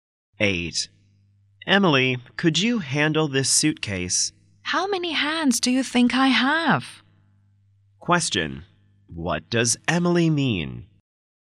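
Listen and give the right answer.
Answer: She can't handle the suitcase; her hands are full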